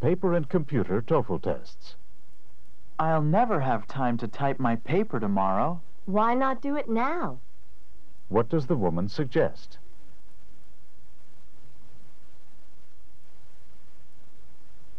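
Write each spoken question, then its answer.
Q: What does the woman suggest?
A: He should type the paper now.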